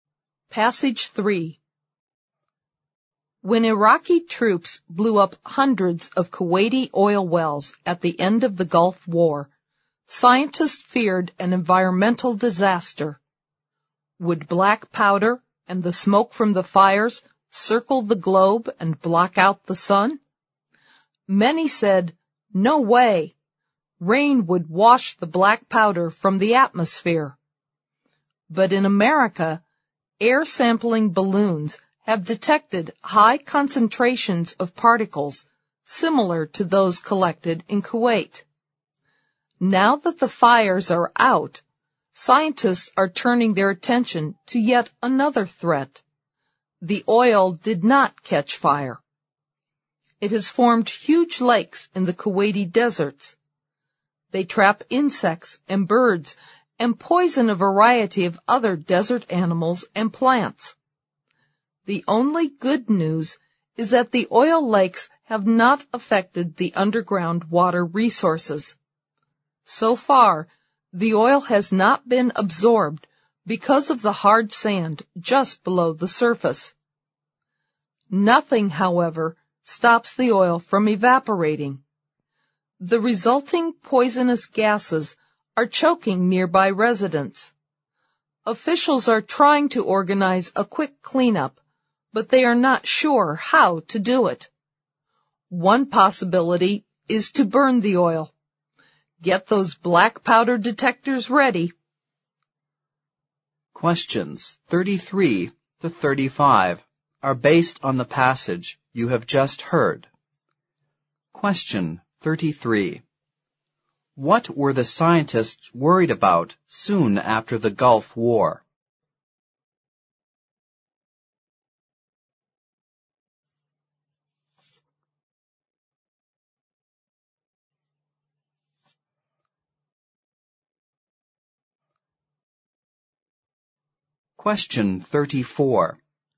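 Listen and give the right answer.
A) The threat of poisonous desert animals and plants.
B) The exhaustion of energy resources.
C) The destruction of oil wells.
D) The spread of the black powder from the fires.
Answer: D) The spread of the black powder from the fires.

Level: 四级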